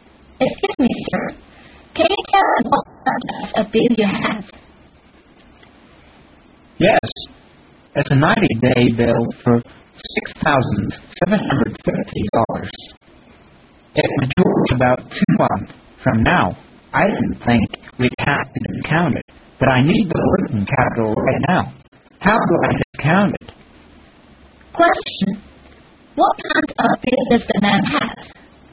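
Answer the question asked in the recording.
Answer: A 90-day bill for $6,750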